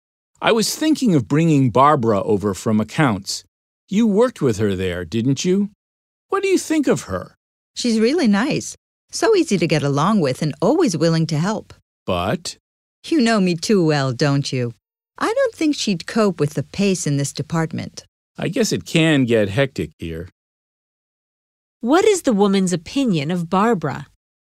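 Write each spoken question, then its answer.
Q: What is the woman's opinion of Barbara?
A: She's nice but couldn't cope with the department's pace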